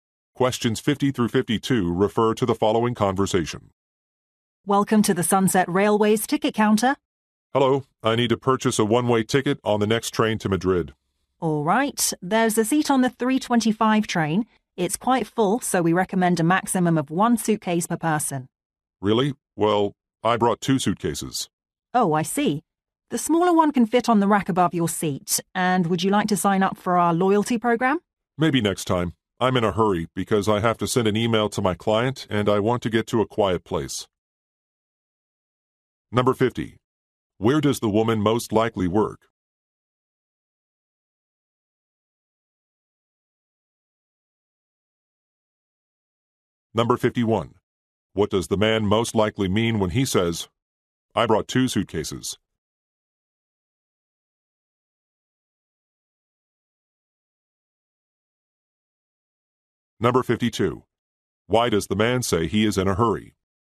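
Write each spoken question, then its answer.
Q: Where does the woman most likely work?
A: At a train station ticket counter

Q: What does the man most likely mean when he says, "I brought two suitcases"?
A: He has more luggage than recommended

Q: Why does the man say he is in a hurry?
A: He needs to email a client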